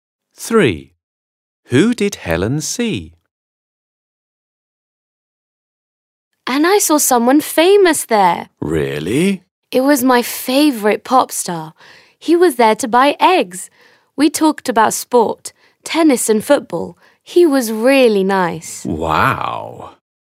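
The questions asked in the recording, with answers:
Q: Who did Helen see?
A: her favourite pop star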